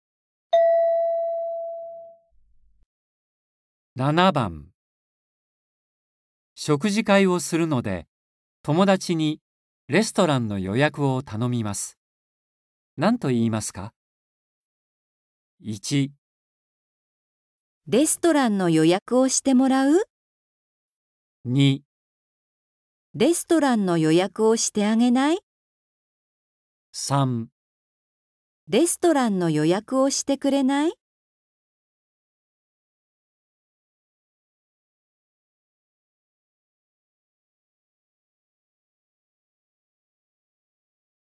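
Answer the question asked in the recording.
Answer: 3

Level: N4.35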